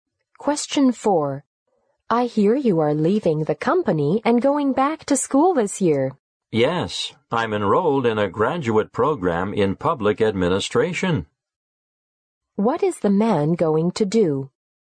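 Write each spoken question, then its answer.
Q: What is the man going to do?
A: Go back to school for a graduate program in public administration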